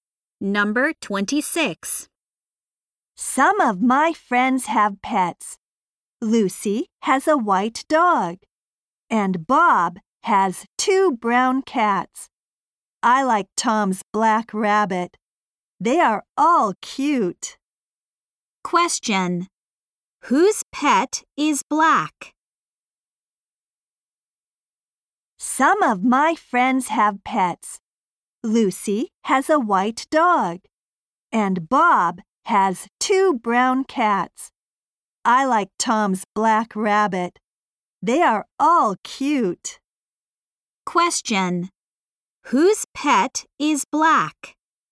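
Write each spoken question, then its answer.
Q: Whose pet is black?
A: Tom's.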